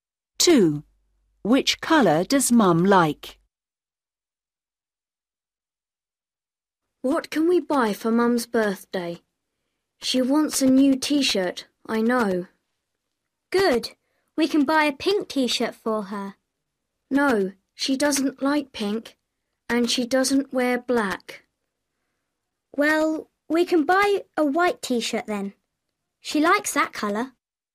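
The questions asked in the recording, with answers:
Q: Which colour does Mum like?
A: White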